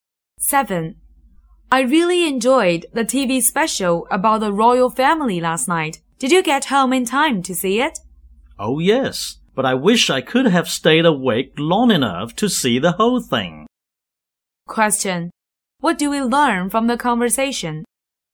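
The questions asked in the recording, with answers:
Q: What do we learn from the conversation?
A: The woman fell asleep before the TV special ended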